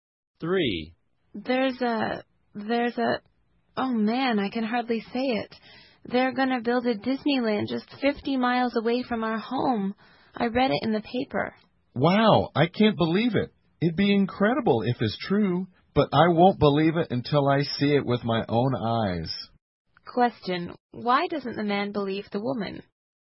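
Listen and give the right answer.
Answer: He won't believe it until he sees it with his own eyes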